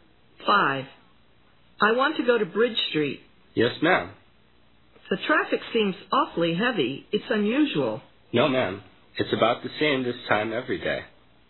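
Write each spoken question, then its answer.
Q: Who is the woman talking with?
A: A taxi driver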